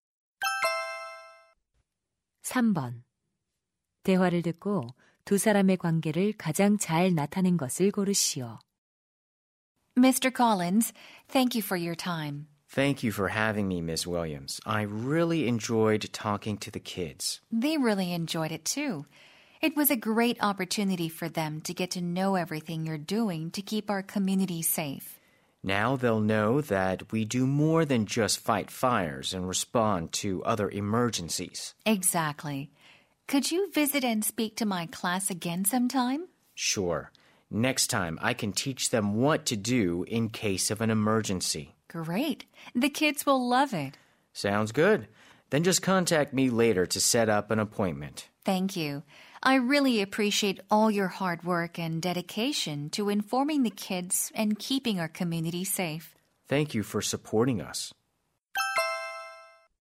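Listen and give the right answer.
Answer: 교사 - 소방관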